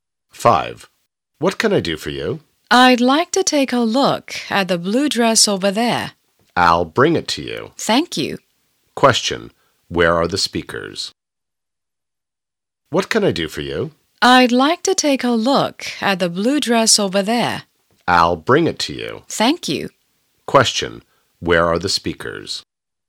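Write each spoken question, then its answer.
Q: Where are the speakers?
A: In a clothes shop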